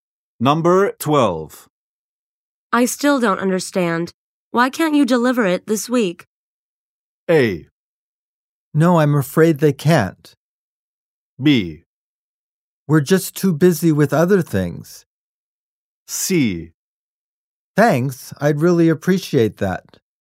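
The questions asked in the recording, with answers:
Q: I still don't understand. Why can't you deliver it this week?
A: B: We're just too busy with other things.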